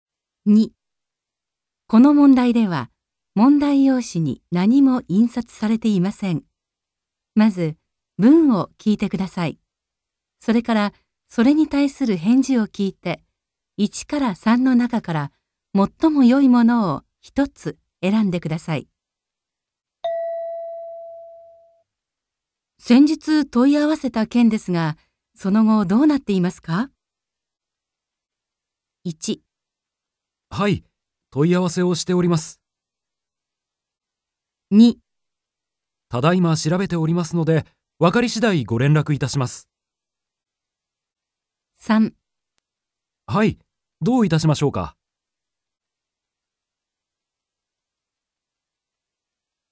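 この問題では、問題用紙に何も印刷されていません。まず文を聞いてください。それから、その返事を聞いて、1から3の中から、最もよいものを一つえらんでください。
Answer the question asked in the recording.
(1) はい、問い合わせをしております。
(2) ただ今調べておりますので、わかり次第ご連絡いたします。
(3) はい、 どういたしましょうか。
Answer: (2) ただ今調べておりますので、わかり次第ご連絡いたします。

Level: N2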